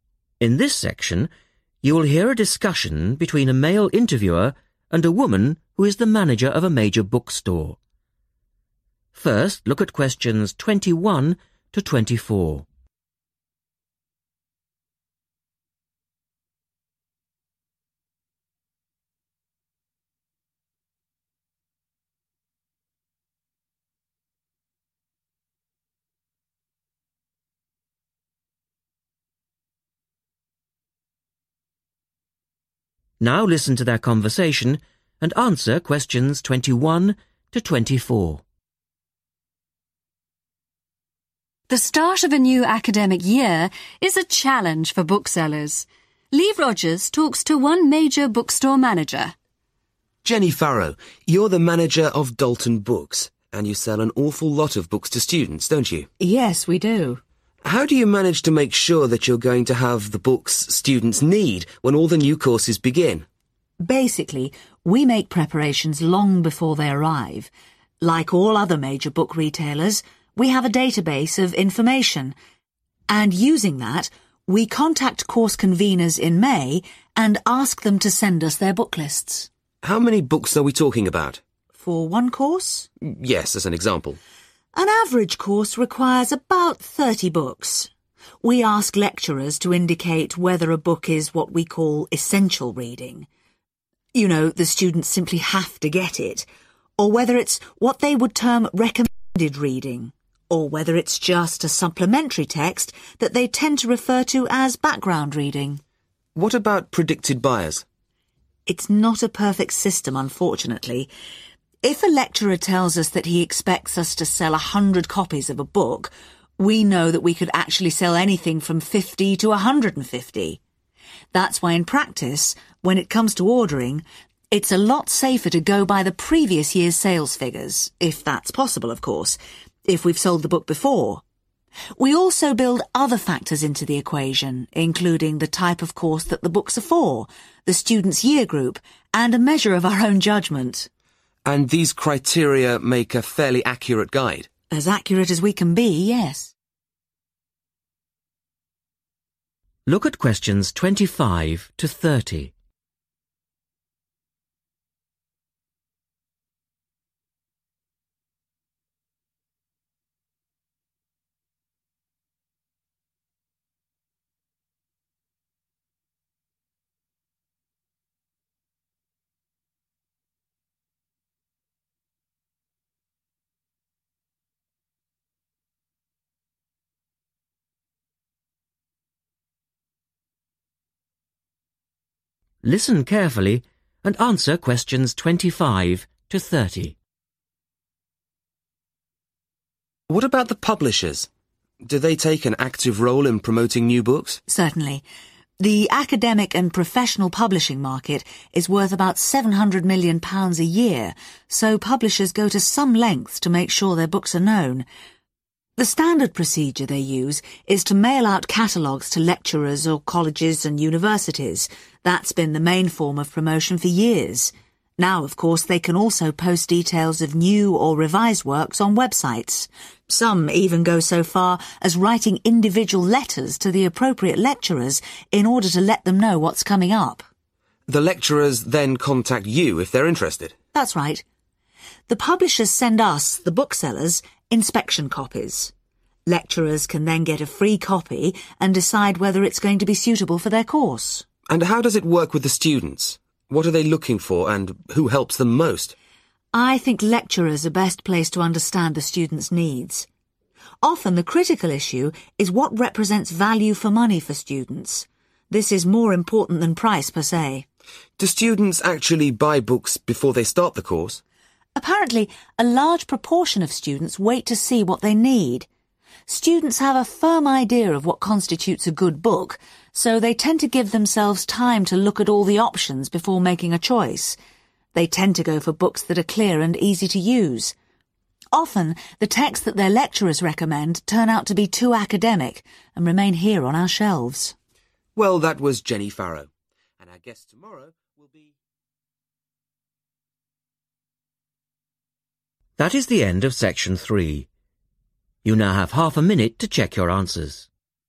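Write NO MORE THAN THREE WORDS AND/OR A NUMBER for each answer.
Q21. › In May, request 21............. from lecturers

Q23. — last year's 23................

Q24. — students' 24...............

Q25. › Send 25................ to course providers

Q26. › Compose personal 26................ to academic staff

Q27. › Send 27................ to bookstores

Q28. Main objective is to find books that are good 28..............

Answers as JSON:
{"21": "book lists", "23": "sales figures", "24": "year group", "25": "catalogues", "26": "letters", "27": "inspection copies", "28": "value for money"}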